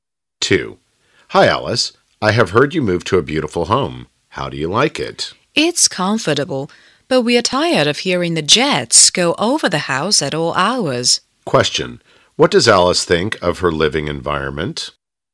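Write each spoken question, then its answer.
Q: What does Alice think of her living environment?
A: It's comfortable but noisy because of the jets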